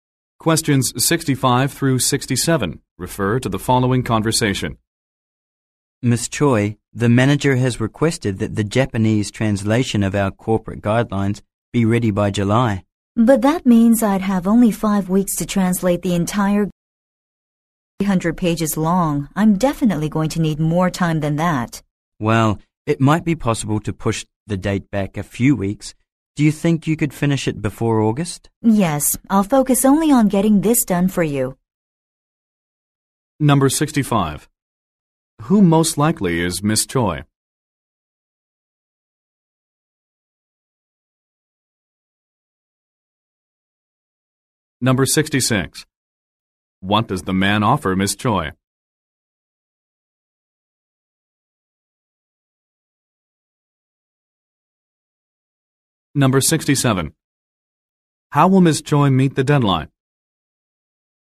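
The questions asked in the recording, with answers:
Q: Who most likely is Miss Choi?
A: A translator

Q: What does the man offer Miss Choi?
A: To push the deadline back a few weeks

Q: How will Miss Choi meet the deadline?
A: By focusing only on this translation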